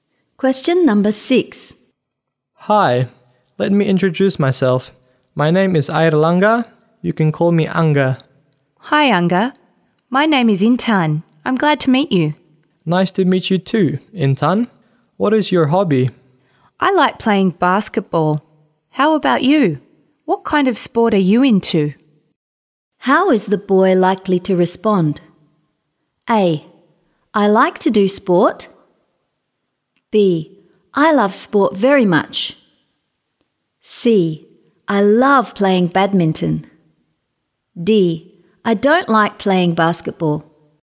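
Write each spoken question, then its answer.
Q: How is the boy likely to respond?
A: C: I love playing badminton.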